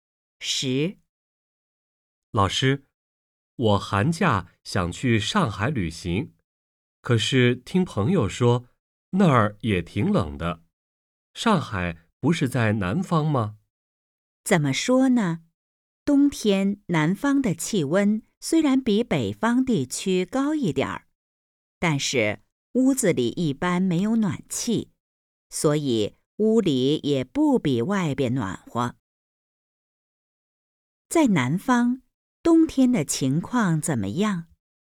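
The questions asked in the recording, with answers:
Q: 在南方,冬天的情况怎么样?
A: 屋子里没有暖气,屋里也不比外边暖和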